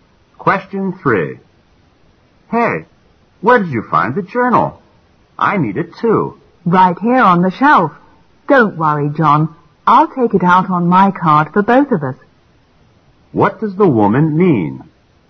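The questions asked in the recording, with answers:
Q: What does the woman mean?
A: She will check out the journal on her card so they can both use it

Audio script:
Q: What does the woman mean?
M: Hey, where did you find the journal? I need it too.
W: Right here on the shelf. Don't worry, John. I'll take it out on my card for both of us.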